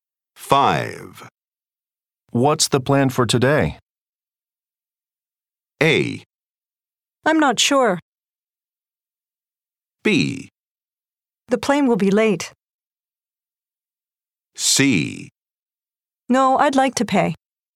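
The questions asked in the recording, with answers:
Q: What's the plan for today?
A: A: I'm not sure.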